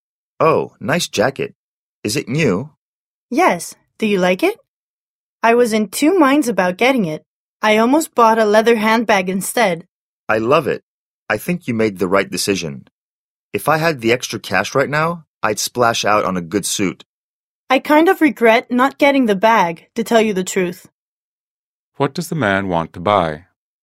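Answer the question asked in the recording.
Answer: A good suit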